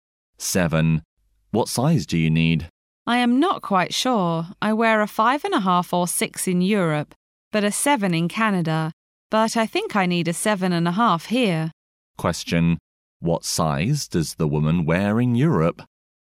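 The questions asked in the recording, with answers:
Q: What size does the woman wear in Europe?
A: 5.5 or 6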